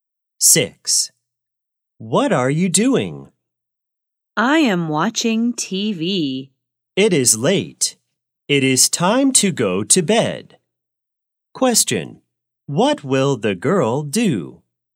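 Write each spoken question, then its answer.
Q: What will the girl do?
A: Go to bed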